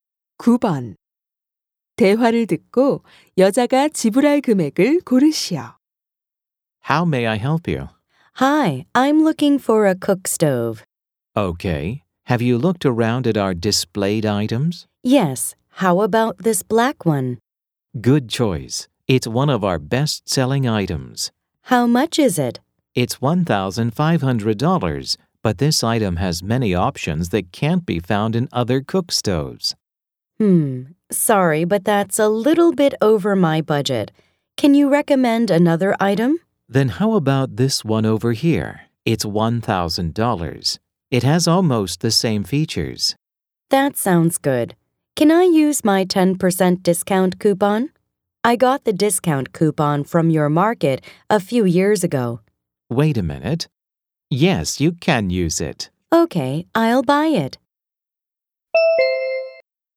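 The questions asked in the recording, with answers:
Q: 대화를 듣고 여자가 지불할 금액을 고르시오.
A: $900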